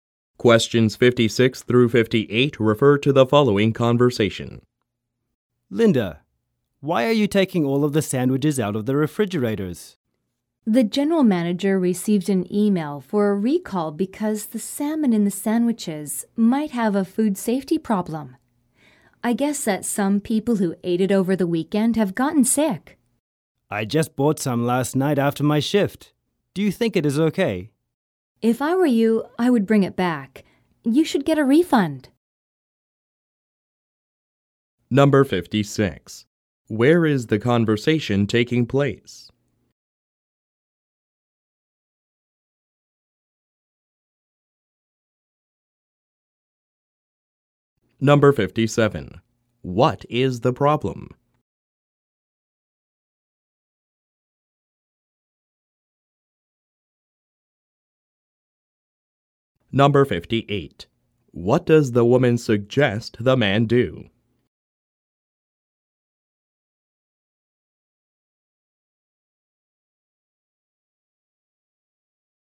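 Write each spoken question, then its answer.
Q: What is the problem?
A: The salmon sandwiches are being recalled because of a possible food safety problem

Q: What does the woman suggest the man do?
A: Return the sandwich and get a refund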